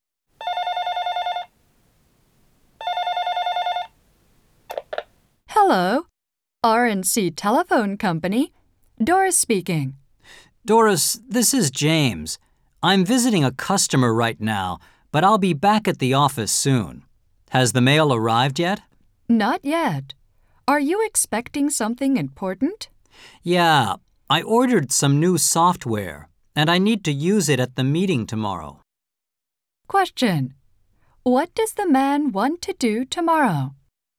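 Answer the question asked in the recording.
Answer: Use his new software at a meeting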